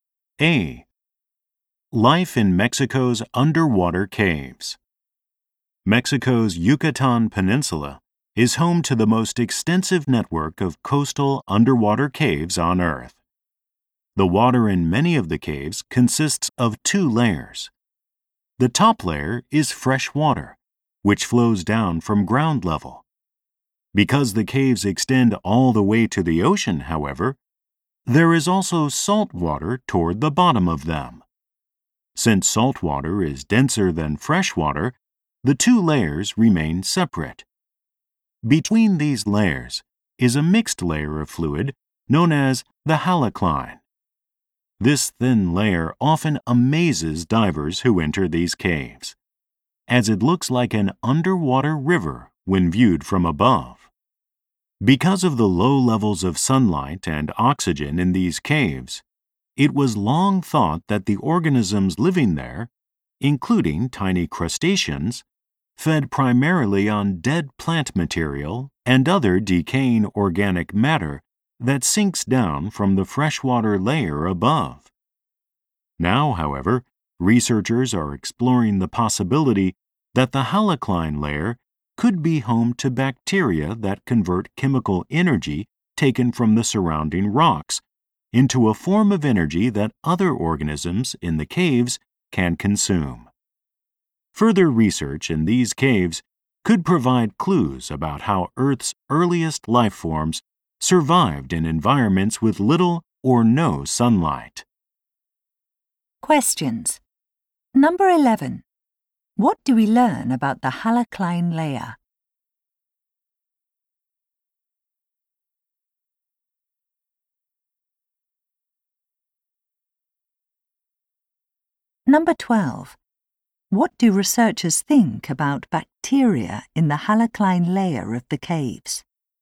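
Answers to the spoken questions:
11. It is a thin mixed layer between fresh and salt water that looks like an underwater river from above.
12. They may convert chemical energy from the surrounding rocks into energy other organisms can consume.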